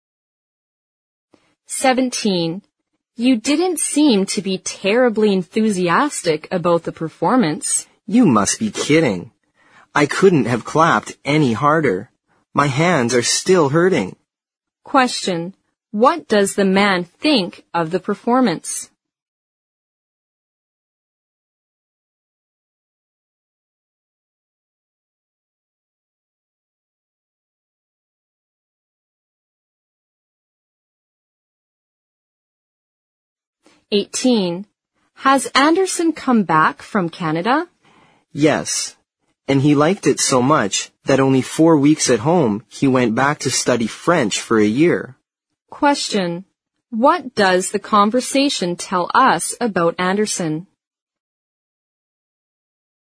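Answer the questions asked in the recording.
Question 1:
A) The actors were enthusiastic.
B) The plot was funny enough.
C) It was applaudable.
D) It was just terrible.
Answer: C) It was applaudable.
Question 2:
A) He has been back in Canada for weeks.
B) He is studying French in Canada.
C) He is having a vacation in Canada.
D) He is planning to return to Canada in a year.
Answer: B) He is studying French in Canada.

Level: 四级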